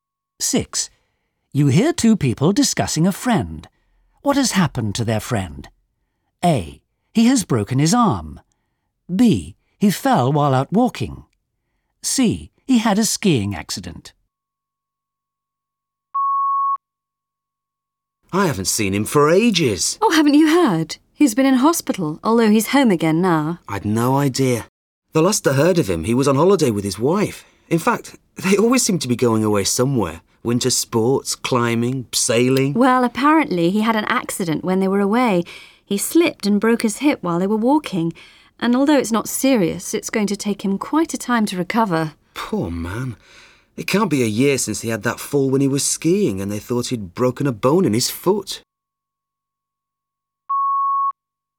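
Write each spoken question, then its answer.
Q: What has happened to their friend?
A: B: He fell while out walking.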